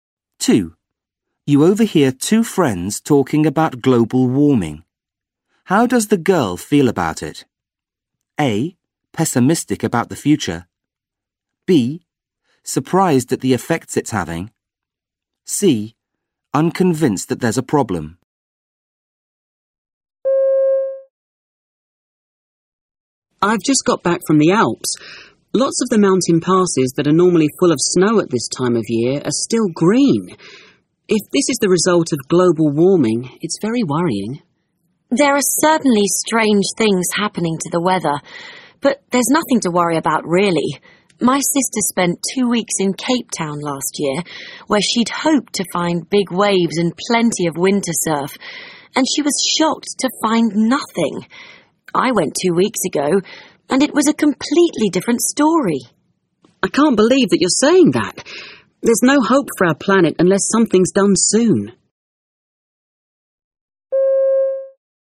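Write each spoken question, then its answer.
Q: How does the girl feel about it?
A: A: Pessimistic about the future.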